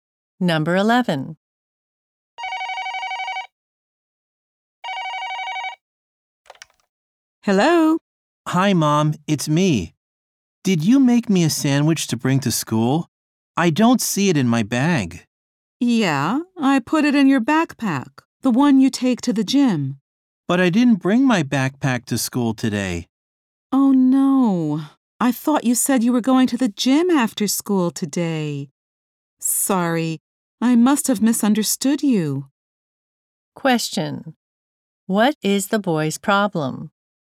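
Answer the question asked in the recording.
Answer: His sandwich is in the backpack he didn't bring.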